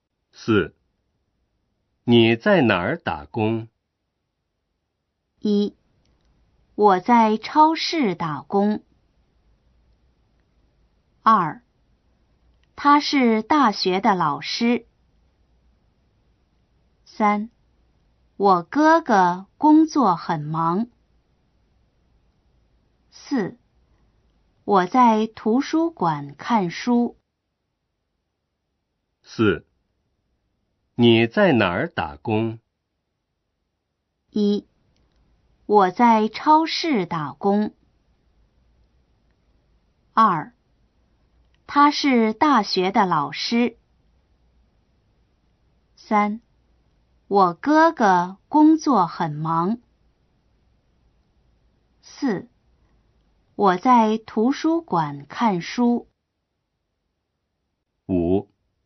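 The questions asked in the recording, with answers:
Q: 你在哪儿打工?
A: 1: 我在超市打工。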